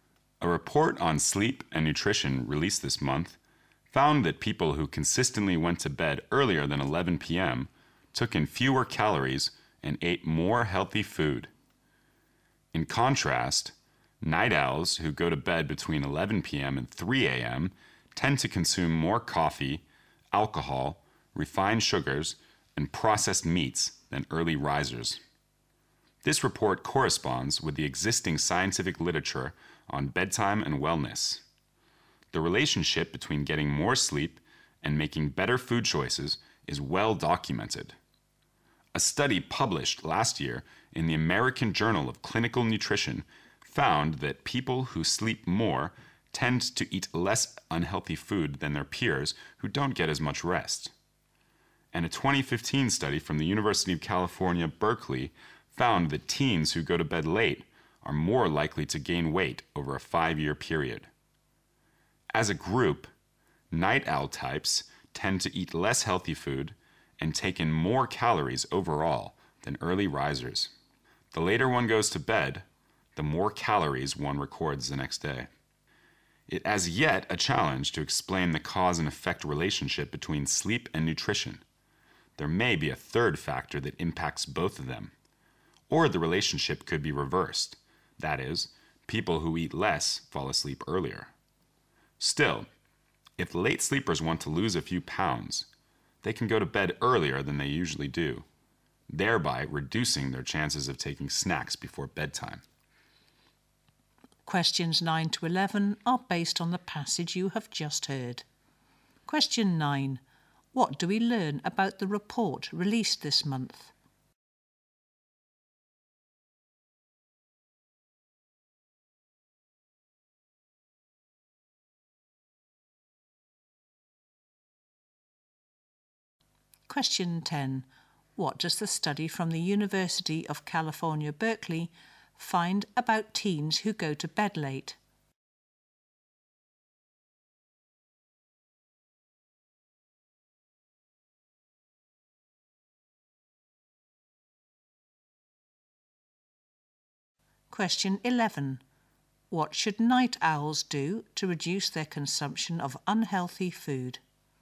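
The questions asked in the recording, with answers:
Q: What do we learn about the report released this month?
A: People who go to bed before 11 p.m. take in fewer calories and eat healthier food

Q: What does the study from the University of California, Berkeley find about teens who go to bed late?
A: They are more likely to gain weight over a 5-year period

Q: What should night owls do to reduce their consumption of unhealthy food?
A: Go to bed earlier than usual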